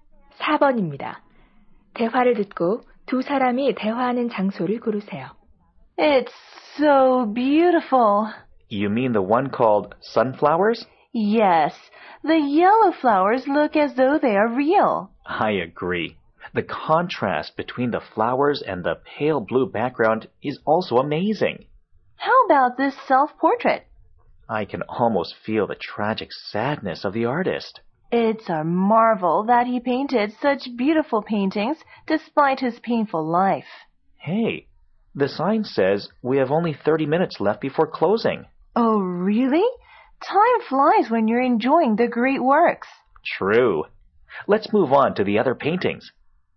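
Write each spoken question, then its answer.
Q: 대화를 듣고 두 사람이 대화하는 장소를 고르세요.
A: 미술관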